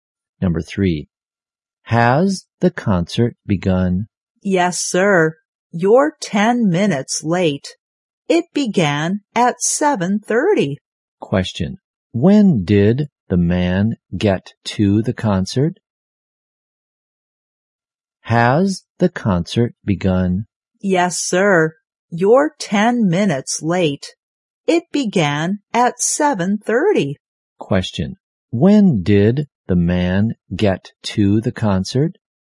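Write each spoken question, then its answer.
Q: When did the man get to the concert?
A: At 7:40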